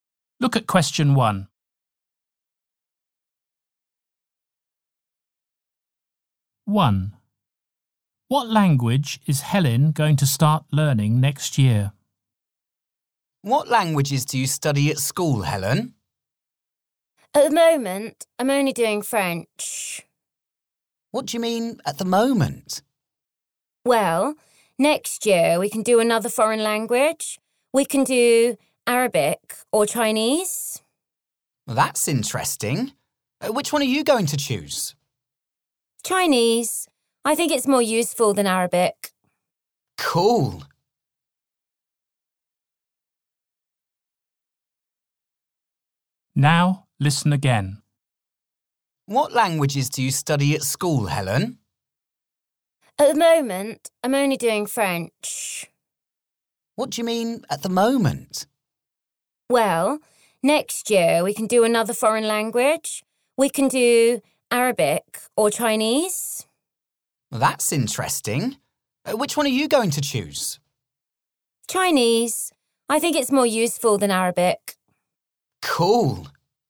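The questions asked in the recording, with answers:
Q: What language is Helen going to start learning next year?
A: Chinese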